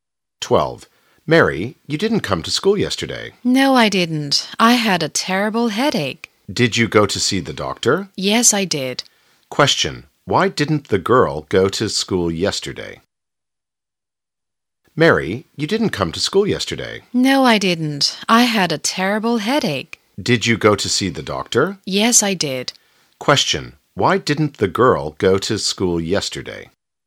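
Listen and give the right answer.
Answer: She had a terrible headache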